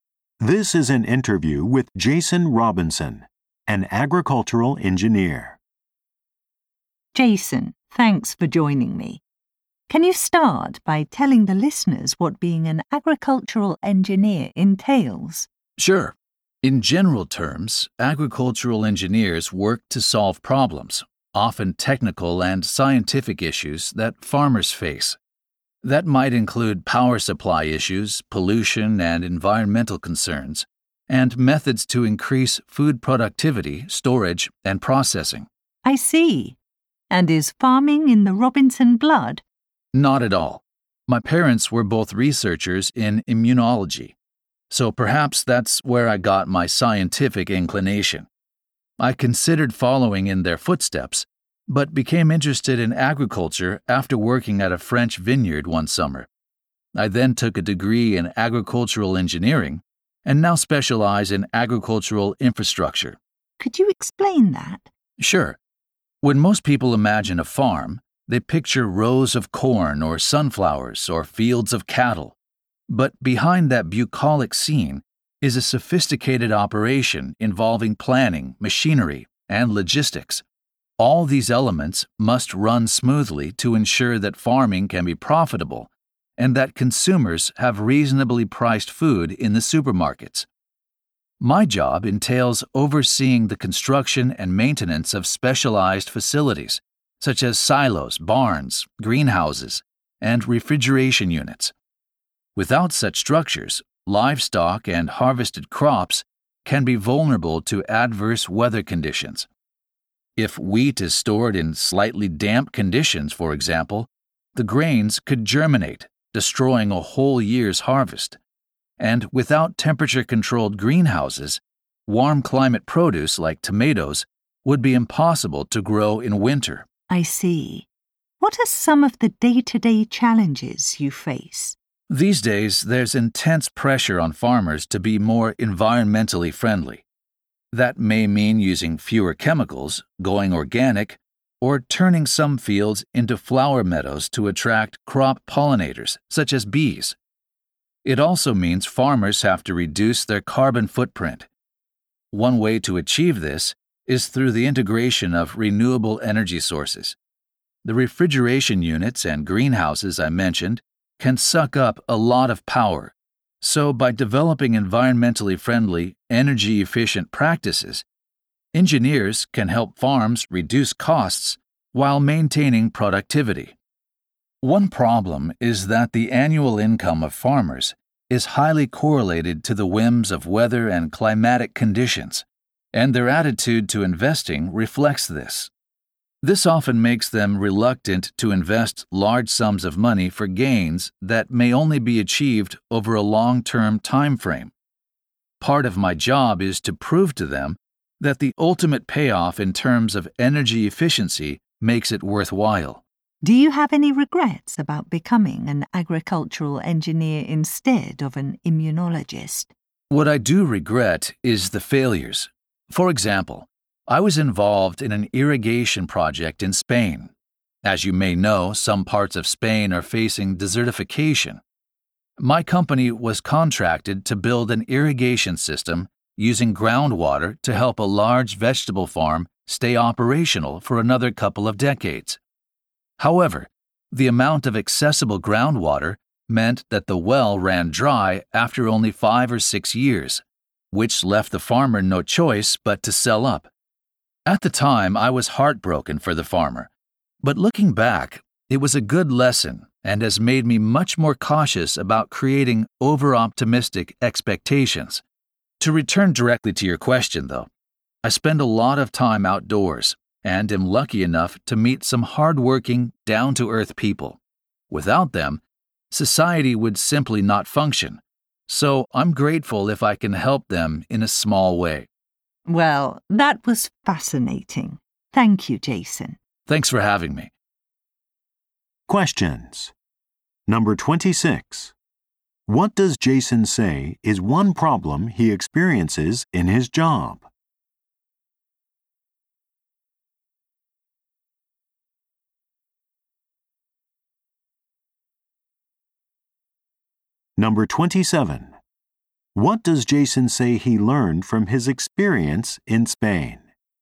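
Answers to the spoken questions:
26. Farmers are reluctant to invest large sums for long-term gains.
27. To be more cautious about creating over-optimistic expectations.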